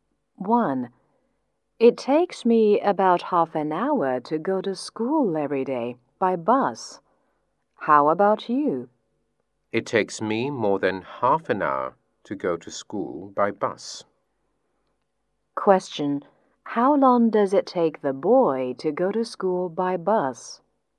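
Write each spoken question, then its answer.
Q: How long does it take the boy to go to school by bus?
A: More than half an hour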